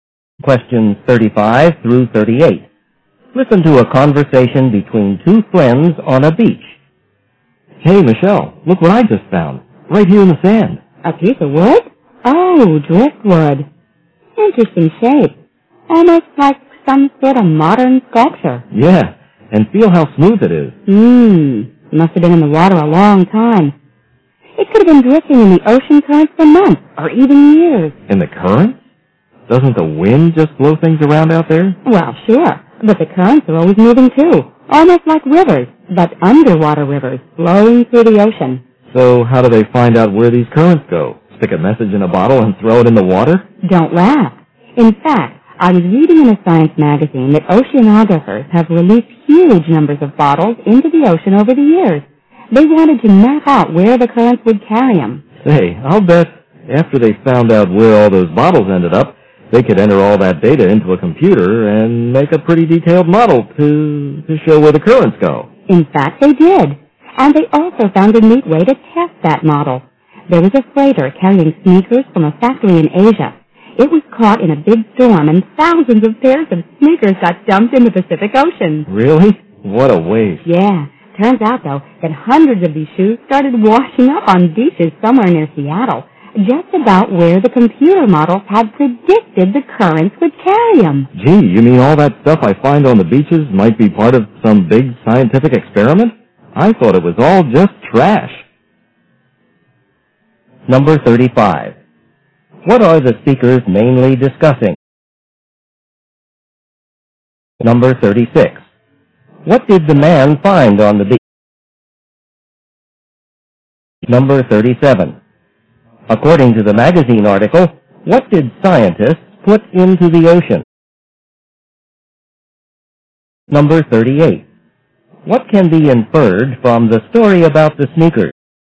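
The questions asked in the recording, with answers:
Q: What are the speakers mainly discussing?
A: Ocean currents

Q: What did the man find on the beach?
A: A piece of driftwood

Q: According to the magazine article, what did scientists put into the ocean?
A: Bottles

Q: What can be inferred from the story about the sneakers?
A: The computer model of the currents was accurate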